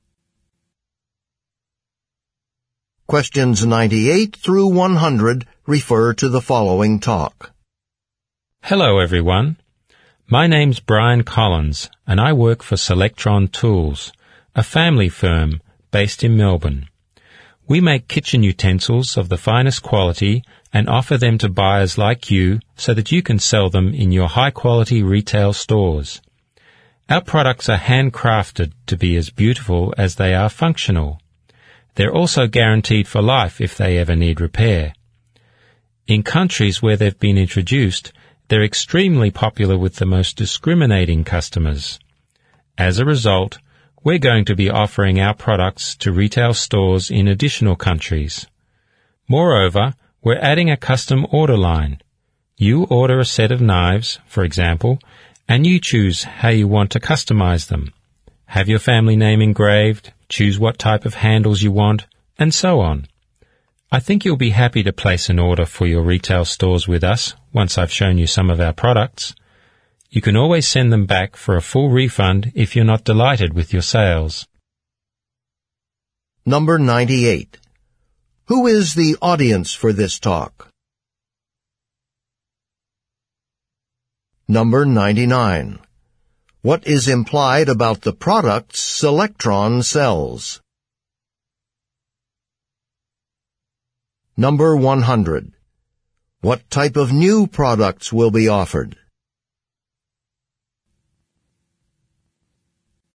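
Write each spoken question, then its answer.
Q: Who is the audience for this talk?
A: Buyers for retail stores

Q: What type of new products will be offered?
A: Custom-ordered (customized) products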